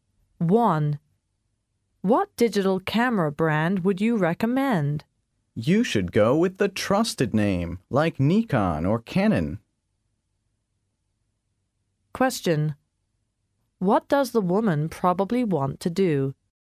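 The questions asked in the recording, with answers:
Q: What does the woman probably want to do?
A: Buy a digital camera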